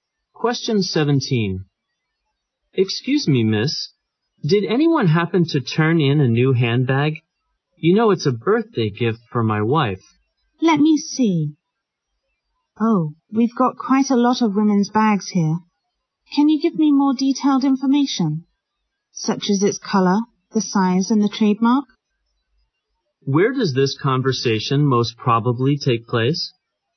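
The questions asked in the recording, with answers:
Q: Where does this conversation most probably take place?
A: At a lost and found office.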